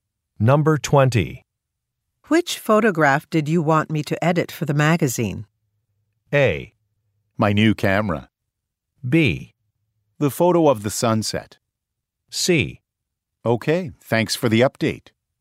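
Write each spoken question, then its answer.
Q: Which photograph did you want me to edit for the magazine?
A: B: The photo of the sunset.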